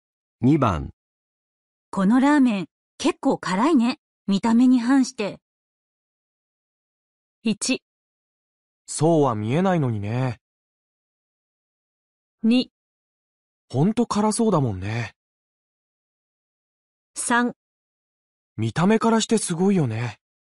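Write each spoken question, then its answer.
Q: このラーメン結構辛いね。見た目に反して。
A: 1: そうは見えないのにね。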